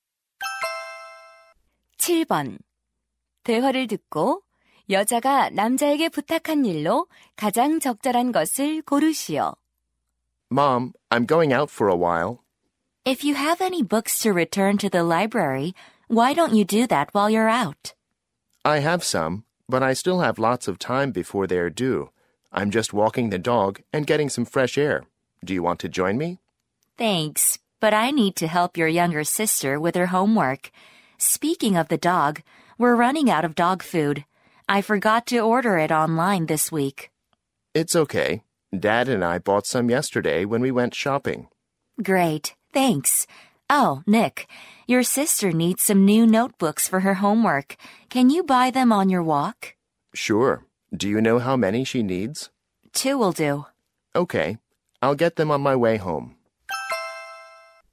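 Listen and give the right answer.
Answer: 여동생의 공책 사 오기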